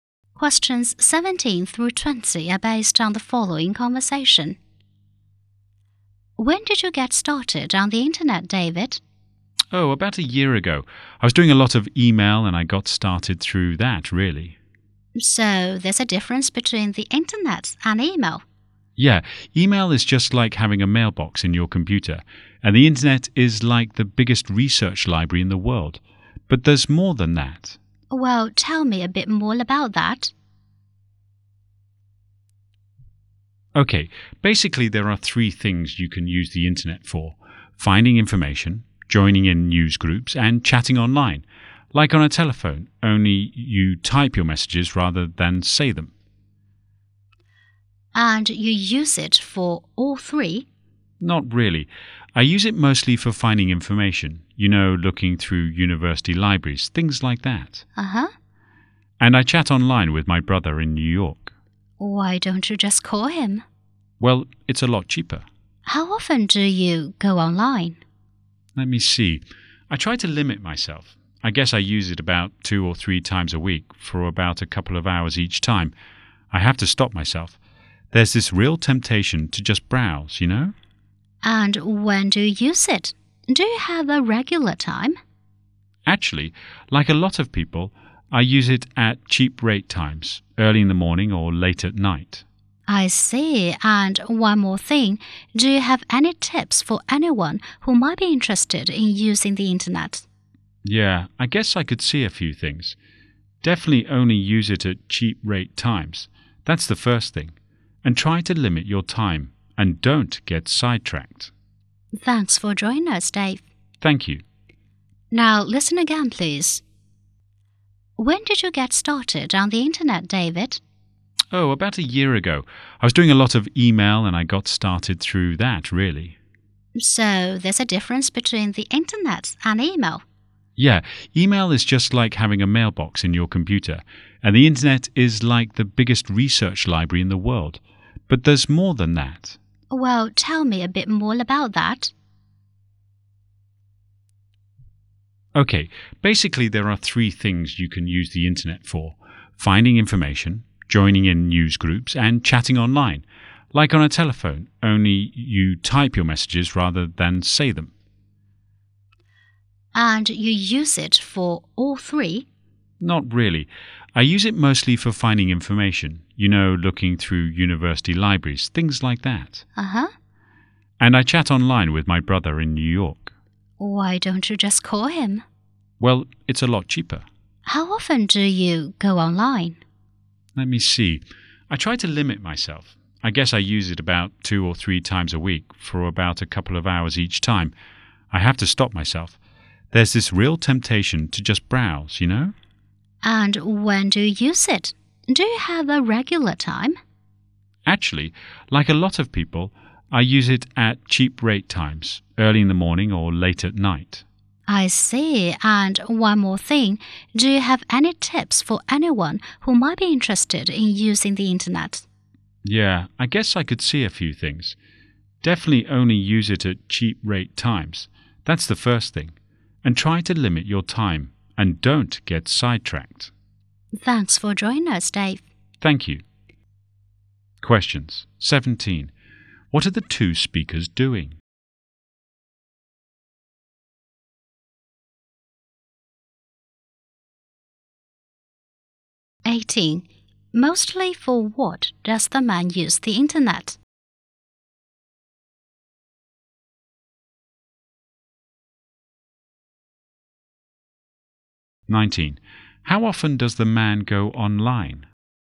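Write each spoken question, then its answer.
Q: What are the two speakers doing?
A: Having an interview about using the internet

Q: Mostly for what does the man use the internet?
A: Finding information

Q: How often does the man go online?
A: 2 or 3 times a week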